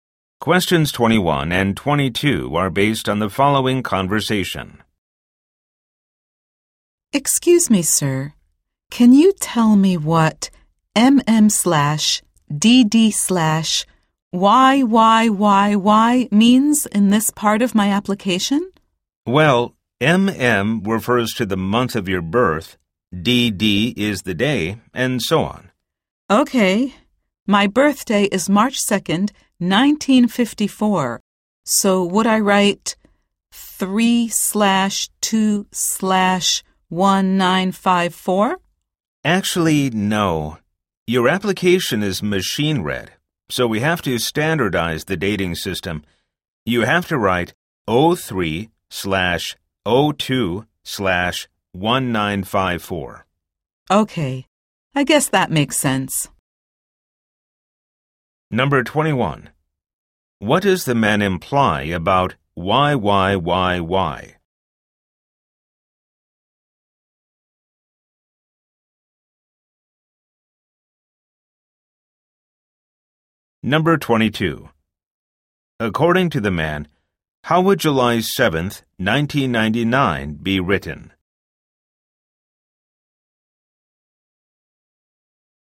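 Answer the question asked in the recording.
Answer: 07/07/1999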